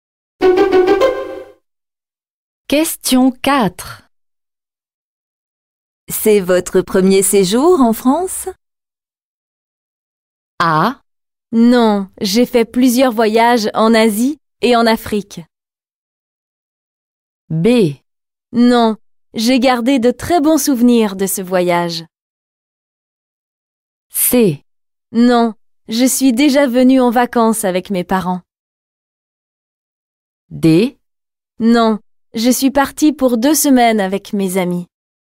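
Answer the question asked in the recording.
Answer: C: Non, je suis déjà venue en vacances avec mes parents.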